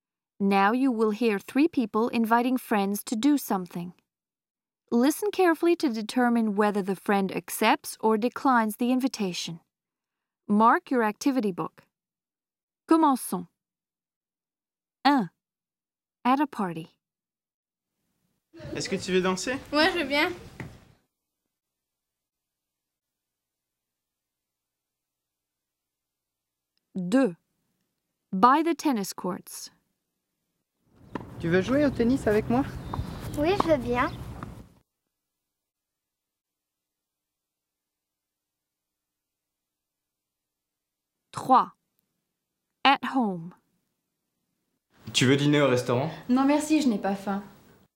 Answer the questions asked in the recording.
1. 1, A.
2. 2, A.
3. 3, B.